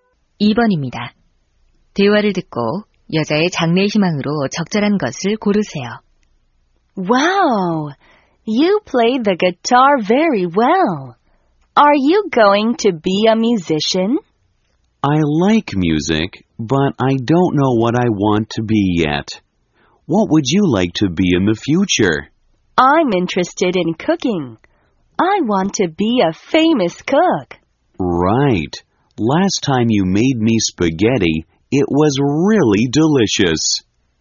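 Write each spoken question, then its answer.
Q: 대화를 듣고 여자의 장래 희망으로 적절한 것을 고르세요.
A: 요리사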